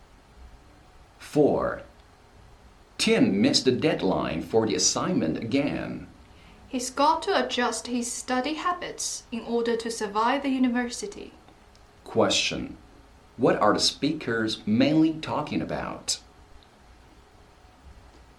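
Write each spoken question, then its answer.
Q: Question.What are the speakers mainly talking about?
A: Tim's study habits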